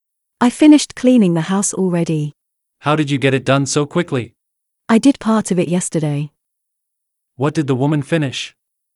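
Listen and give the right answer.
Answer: Cleaning the house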